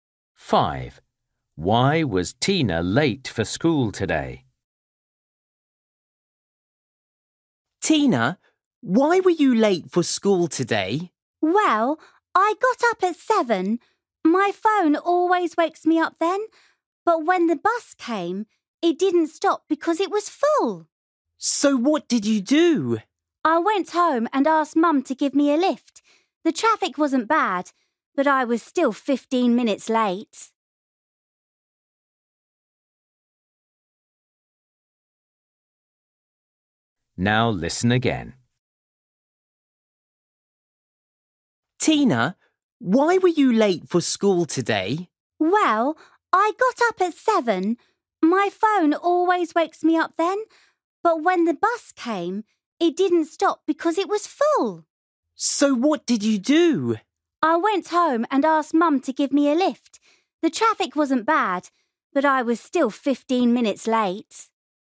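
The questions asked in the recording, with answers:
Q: Why was Tina late for school today?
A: The bus was full and didn't stop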